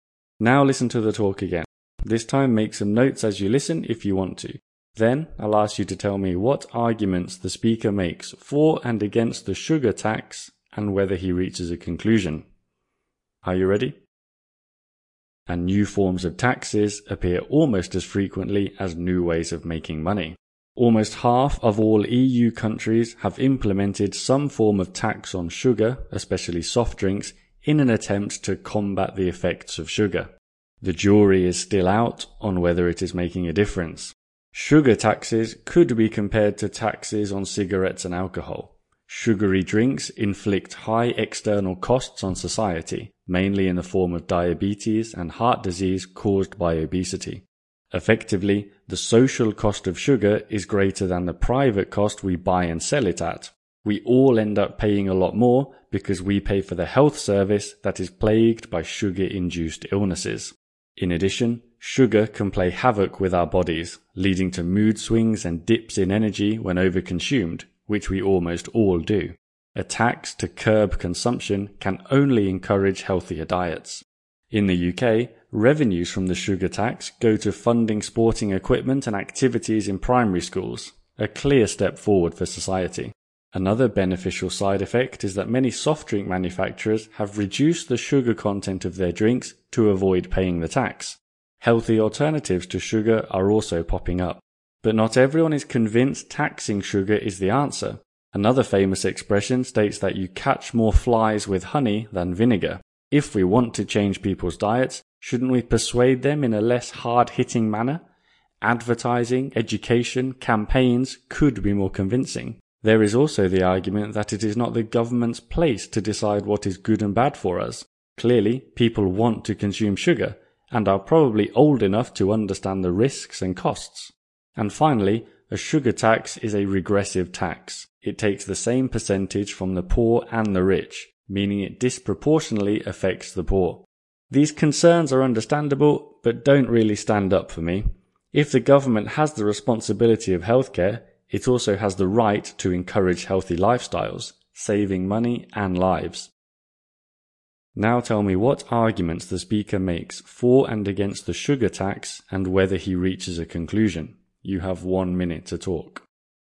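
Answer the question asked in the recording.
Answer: For: it cuts health costs from obesity, encourages healthier diets, funds school sport and makes companies use less sugar. Against: persuasion might work better, the government shouldn't decide for people, and it hits the poor hardest. Conclusion: he supports the tax.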